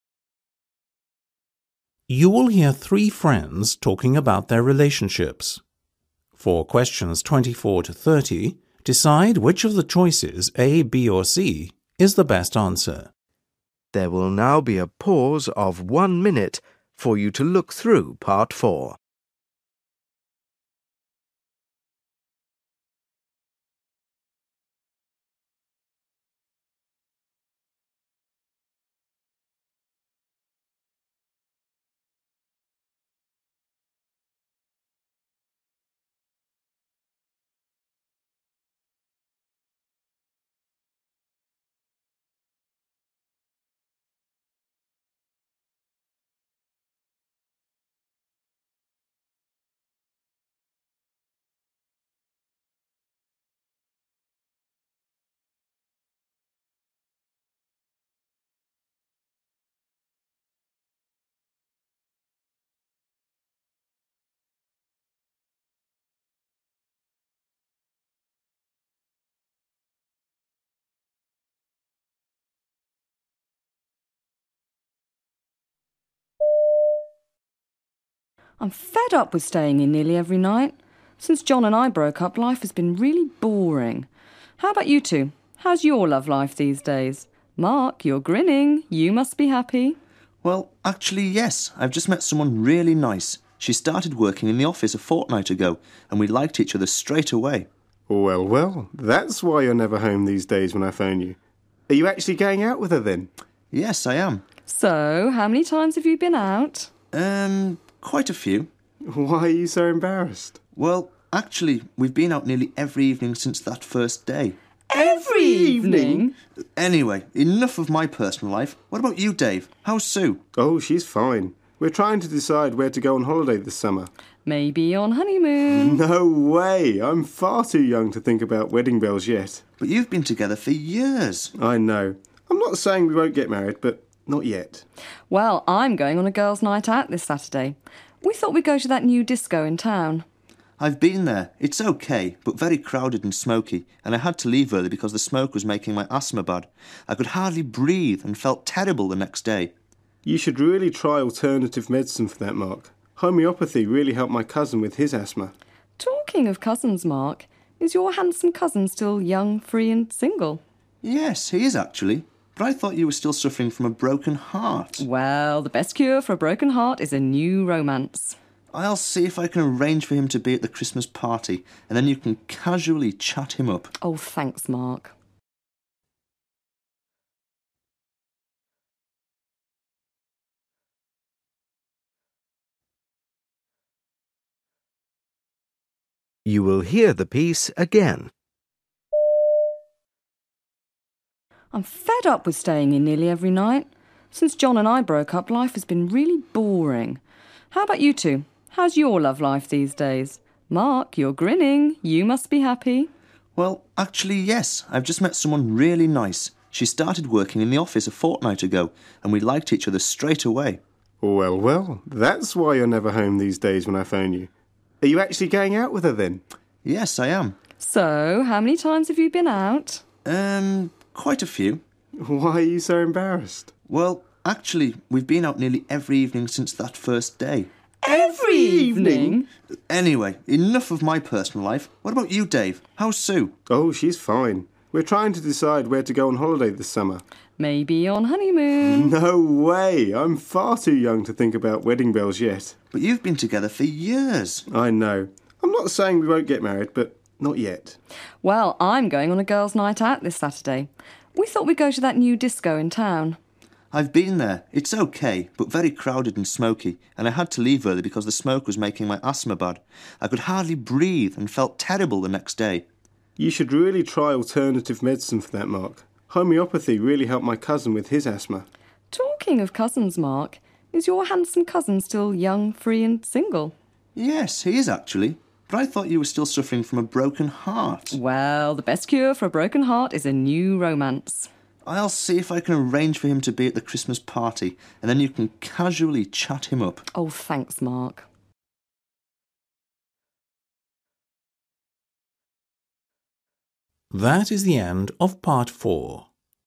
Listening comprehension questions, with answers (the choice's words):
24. What's Anne's problem?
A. She's got no one to go out with.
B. She's angry with her boyfriend.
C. She has hurt herself.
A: She's got no one to go out with.

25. What does Mark do?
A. He gets angry with Anne.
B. He tries to change the subject.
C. He asks Sue about her boyfriend.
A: He tries to change the subject.

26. Who has been hard to get in touch with recently?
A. Mark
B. Dave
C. Anne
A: Mark

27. What does Dove soy?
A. He will never get married to Sue.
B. He Isn't sure if he is going to go on holiday or not.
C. He doesn't know where to go on holiday.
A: He doesn't know where to go on holiday.

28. What is Mark's problem?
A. He smokes too much.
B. He goes out too often.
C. He has a medical problem.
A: He has a medical problem.

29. How con Anne be described at the end?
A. sad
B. optimistic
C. nervous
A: optimistic

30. What is Mark's attitude towards Anne?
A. He disapproves of her dating someone else so quickly.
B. He wonts to try to help her.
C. He thinks it is unlikely that her cousin will be interested in her.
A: He wonts to try to help her.

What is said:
A: I'm fed up with staying in nearly every night. Since John and I broke up life has been really boring. How about you two, how's your love life these days? Mark you're grinning, you must be happy.
M: Well actually yes I've just met someone really nice. She started working in the office a fortnight ago and we liked each other straight away.
D: Well, well. That's why you're never home these days when I phone you. Are you actually going out with her then?
M: Yes I am.
A: So how many times have you been out?
M: Erm, quite a few.
D: Why are you so embarrassed?
M: Well actually, we've been out nearly every evening since that first day.
D/A: Every evening!
M: Anyway, enough of my personal life. What about you Dave? How's Sue?
D: Oh she's fine. We're trying to decide where to go on holiday this summer.
A: Maybe on honeymoon?
D: No way! I'm far too young to think about wedding bells yet.
M: But you've been together for years.
D: I know. I'm not saying we won't get married but not yet.
A: Well I'm going on a girls' night out this Saturday. We thought we'd go to that new disco in town.
M: I've been there, it's okay but very crowded and smoky and I had to leave early because the smoke was making my asthma bad. I could hardly breathe and felt terrible the next day.
D: You should really try alternative medicine for that Mark. Homeopathy really helped my cousin with his asthma.
A: Talking of cousins Mark, is your handsome cousin still young, free and single?
M: Yes he is actually, but I thought you were still suffering from a broken heart.
A: Well, the best cure for a broken heart is a new romance!
M: I'll see if I can arrange for him to be at the Christmas party and then you can casually chat him up.
A: Oh, thanks, Mark.

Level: Practice FCE (B2) Listening Test 08